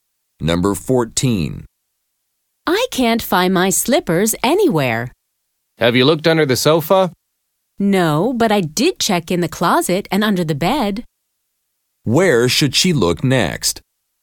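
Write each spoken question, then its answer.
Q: Where should she look next?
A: Under the sofa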